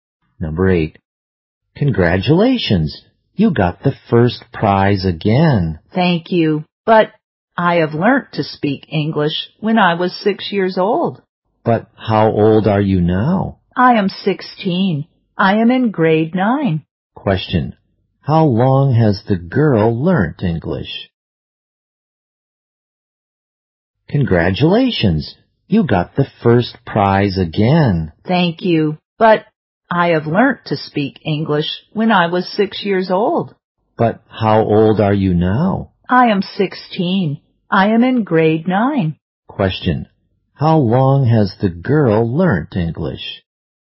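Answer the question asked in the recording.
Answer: For 10 years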